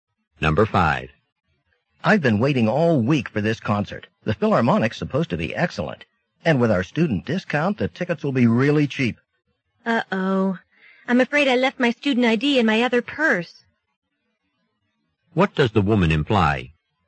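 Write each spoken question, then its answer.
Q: What does the woman imply?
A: She may not get the student discount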